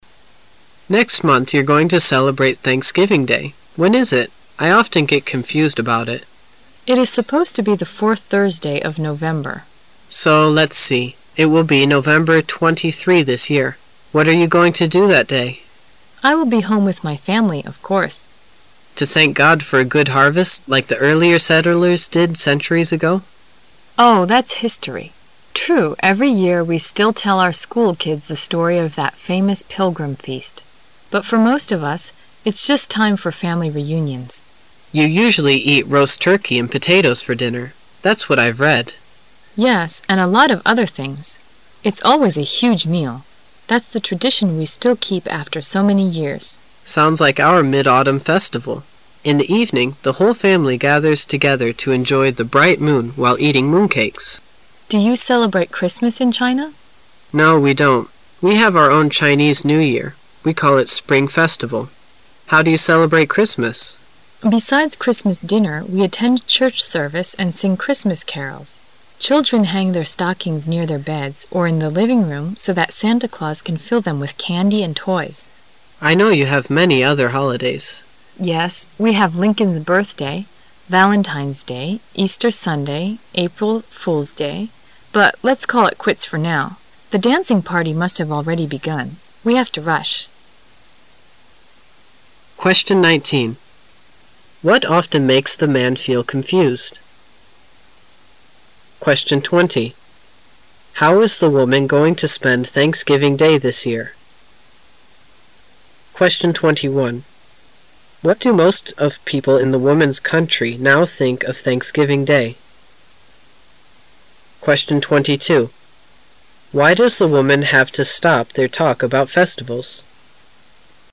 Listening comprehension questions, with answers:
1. How is the woman going to spend Thanksgiving Day this year?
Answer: Celebrate it with her family.

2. What do most of people in the woman's country now think of Thanksgiving Day?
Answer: They only think it time for family to gather together ago.

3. Why does the woman have to stop their talk about festivals?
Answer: Because they have to rush to the dancing party.

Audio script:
[解析] 19-22 M: Next month you're going to celebrate Thanksgiving Day. When is it? I often get confused about it. W: It is supposed to be the fourth Thursday of November. M: So, let's see ... it will be November 23 this year. What are you going to do that day? W: I will be home with my family, of course. M: To thank God for a good harvest like the earlier settlers did centuries ago? W: Oh, that's history. True, every year we still tell our school kids the story of that famous Pilgrim feast. but for most of us, it's just time for family reunions. M: You usually eat roast turkey and potatoes for dinner. That's what I've read. W: Yes, and a lot of other things. It's always a huge meal. That's the tradition we still keep after so many years. M: Sounds like our Mid-Autumn Festival. In the evening, the whole family gathers together to enjoy the bright moon while eating mooncakes. W: Do you celebrate Christmas in China? M: No, we don't. We have our own Chinese New Year. We call it Spring Festival. W: Besides Christmas dinner, we attend Church service and sing Christmas carols. Children hang their stockings near their beds or in the living room so that Santa Claus can fill them with candy and toys. M: I know you have many other holidays. W: Yes, we have Lincoln's birthday, Valentine's Day, Easter Sunday, April Fool's Day, but let's call it quits for now. The dancing party must have already begun. We have to rush. 19.What often makes the man feel confused?